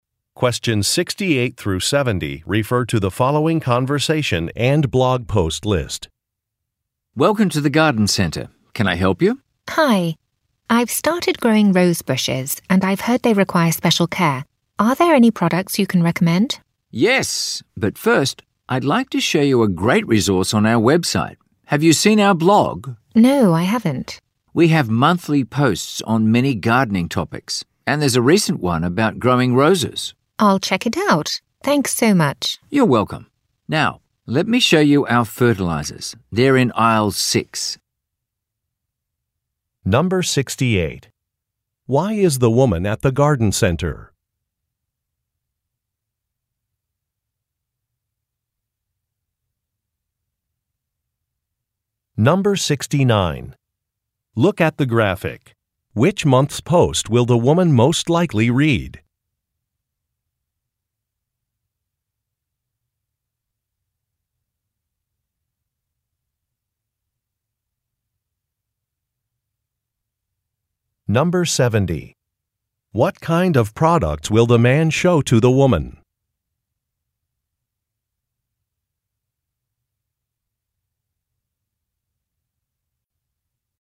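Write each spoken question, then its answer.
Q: Why is the woman at the garden center?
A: To get product advice for caring for her rose bushes

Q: What kind of products will the man show to the woman?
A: Fertilizers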